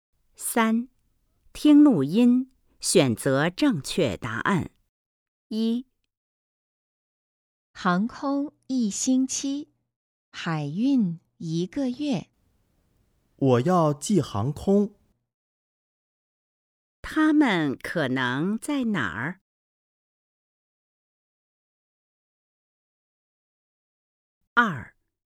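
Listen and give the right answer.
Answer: 邮局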